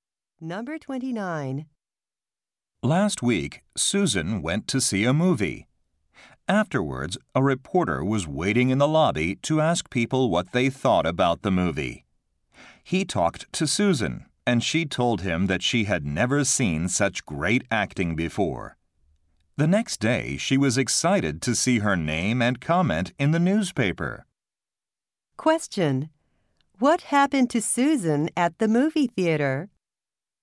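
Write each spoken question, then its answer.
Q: What happened to Susan at the movie theater?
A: A reporter interviewed her about the movie.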